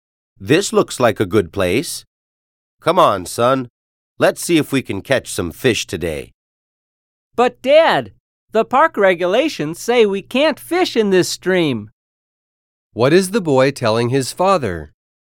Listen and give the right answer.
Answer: If the park regulations say that people can't fish in a certain stream, that means that they are not allowed to fish there.